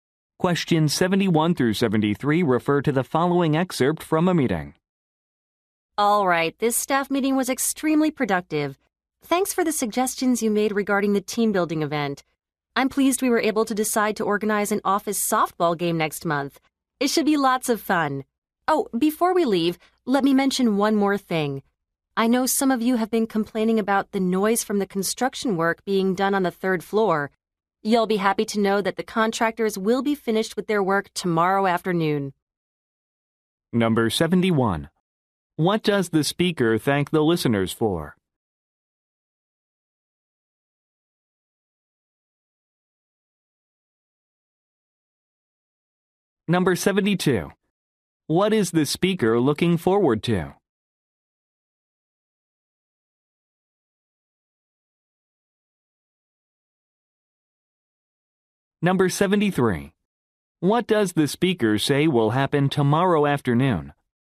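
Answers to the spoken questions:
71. Their suggestions about the team building event
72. An office softball game next month
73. The construction work will be finished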